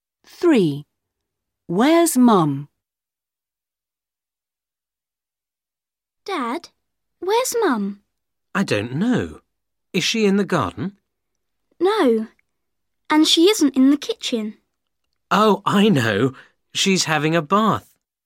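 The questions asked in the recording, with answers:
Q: Where's Mum?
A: in the bath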